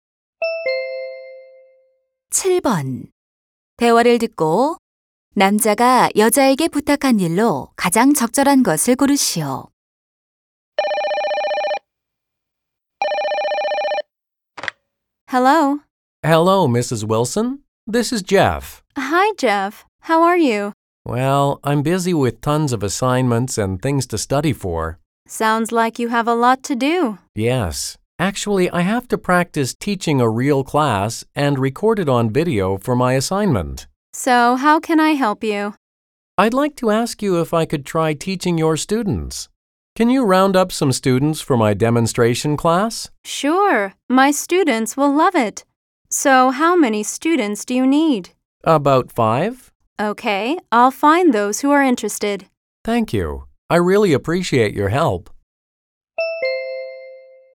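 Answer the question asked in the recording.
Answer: 시범 수업을 위한 학생 모아 주기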